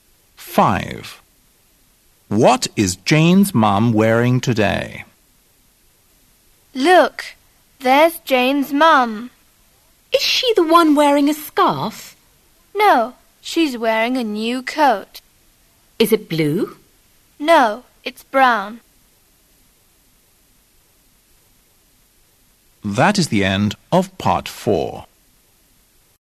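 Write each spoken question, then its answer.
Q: What is Jane's mum wearing today?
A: A brown coat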